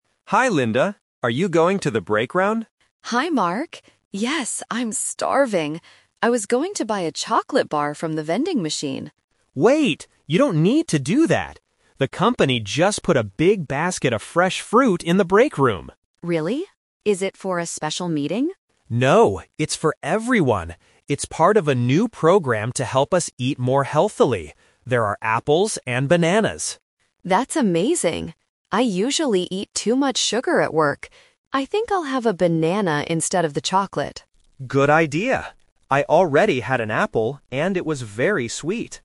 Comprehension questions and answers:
Listen to the conversation between two colleagues. Choose the correct answer (A, B, or C) for each question.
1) What did Linda originally want to buy?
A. An apple.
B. A chocolate bar.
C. A healthy snack.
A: B. A chocolate bar.

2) Why is there free fruit in the breakroom?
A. To encourage employees to be healthy.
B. Because there was a special meeting.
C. Because the vending machine is empty.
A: A. To encourage employees to be healthy.

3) What is Linda going to eat now?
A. A chocolate bar.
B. An apple.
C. A banana.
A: C. A banana.

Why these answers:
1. Linda says, "I was going to buy a chocolate bar from the vending machine." Option (A) is a trap because fruit is mentioned later. Option (C) is what she ends up doing, but not her original intent.
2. Mark explains it's "part of a new program to help us eat more healthily." Option (B) is a trap; Linda asks if it's for a meeting, but Mark says "No." Option (C) is a plausible reason for a vending machine context but is not mentioned.
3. At the end, Linda decides: "I think I'll have a banana instead of the chocolate." Option (A) is the trap (her first plan which she changed). Option (B) is another trap; Mark is the one who ate an apple, not Linda.

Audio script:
Mark: Hi Linda! Are you going to the breakroom?
Linda: Hi Mark. Yes, I'm starving! I was going to buy a chocolate bar from the vending machine.
Mark: Wait! You don't need to do that. The company just put a big basket of fresh fruit in the breakroom.
Linda: Really? Is it for a special meeting?
Mark: No, it's for everyone. It's part of a new program to help us eat more healthily. There are apples and bananas.
Linda: That's amazing! I usually eat too much sugar at work. I think I'll have a banana instead of the chocolate.

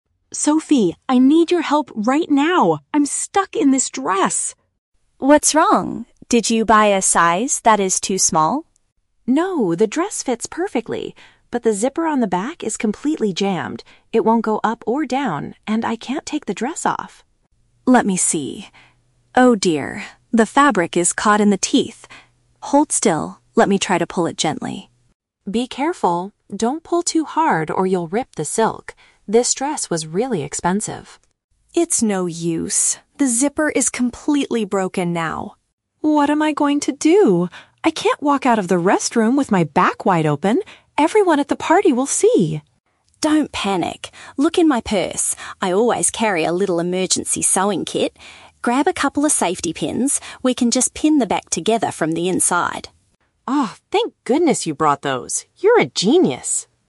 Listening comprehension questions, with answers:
Listen to the conversation between two friends in a restroom. For each question, choose the correct answer (A, B, or C).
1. What is the main reason Emma is panicking?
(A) The dress she bought is much too small for her.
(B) The fastener on her clothing refuses to move.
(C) She accidentally tore a large hole in her silk dress.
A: (B) The fastener on her clothing refuses to move.

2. What does Emma warn Sophie NOT to do?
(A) Use too much physical force while trying to help.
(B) Leave her completely alone in the public restroom.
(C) Pierce the delicate silk material with a sewing needle.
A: (A) Use too much physical force while trying to help.

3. How will the two friends eventually solve the wardrobe problem?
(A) Emma will change into an extra outfit from Sophie's bag.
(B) They will go out and buy a brand new dress for the party.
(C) They will use small metal clips to temporarily close the dress.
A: (C) They will use small metal clips to temporarily close the dress.

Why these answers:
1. Emma says the "zipper on the back is completely jammed" and "won't go up or down". A zipper is paraphrased as a "fastener", and "jammed" means it "refuses to move". Option A is a trap; Sophie asks if the dress is too small, but Emma says it "fits perfectly". Option C is a trap; Emma warns Sophie not to "rip the silk", but it hasn't happened yet.
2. Emma tells Sophie, "Don't pull too hard". This is paraphrased as "Use too much physical force". Option B is a plausible fear in this situation, but Emma never explicitly warns Sophie not to leave. Option C is a trap; a "sewing kit" is mentioned later, but Emma doesn't warn Sophie about needles.
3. Sophie suggests grabbing a couple of "safety pins" to "pin the back together". Safety pins are paraphrased as "small metal clips". Option A is a trap; Sophie's "purse" (bag) is mentioned, but Emma is getting a sewing kit out of it, not an extra outfit. Option B is plausible but not mentioned in the audio.

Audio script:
Emma: Sophie, I need your help right now! I'm stuck in this dress.
Sophie: What's wrong? Did you buy a size that is too small?
Emma: No, the dress fits perfectly. But the zipper on the back is completely jammed. It won't go up or down, and I can't take the dress off!
Sophie: Let me see... Oh dear, the fabric is caught in the teeth. Hold still, let me try to pull it gently.
Emma: Be careful! Don't pull too hard or you'll rip the silk. This dress was really expensive.
Sophie: It's no use. The zipper is completely broken now.
Emma: What am I going to do? I can't walk out of the restroom with my back wide open! Everyone at the party will see.
Sophie: Don't panic. Look in my purse. I always carry a little emergency sewing kit. Grab a couple of safety pins. We can just pin the back together from the inside.

